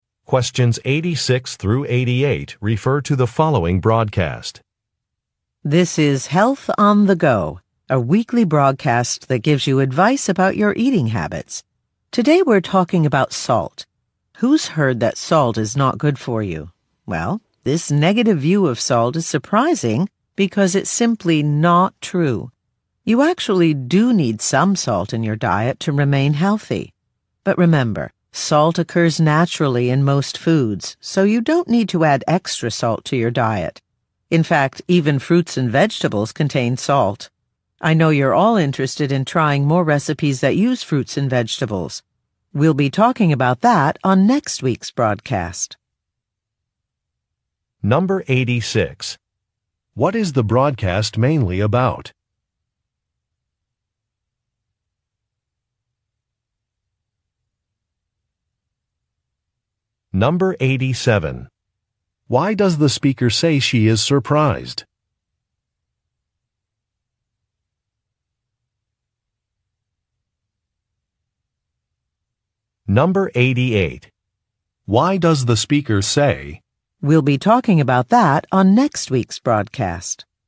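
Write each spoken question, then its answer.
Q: What is the broadcast mainly about?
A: Salt in people's diets

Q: Why does the speaker say she is surprised?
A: Because people think salt is bad, which is not true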